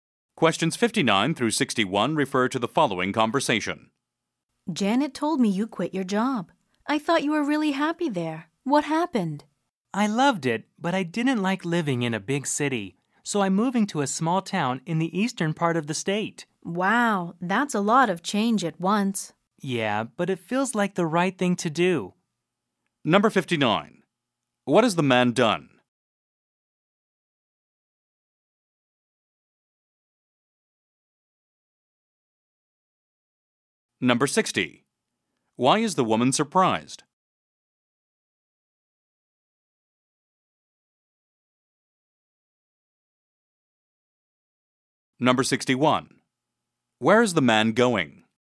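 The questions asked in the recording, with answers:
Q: What has the man done?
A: Quit his job

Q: Why is the woman surprised?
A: She thought he was happy at his job

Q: Where is the man going?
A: To a small town in the eastern part of the state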